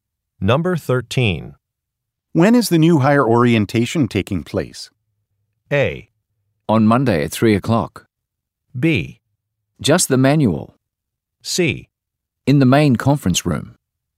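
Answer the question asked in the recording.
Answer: A: On Monday at 3 o'clock.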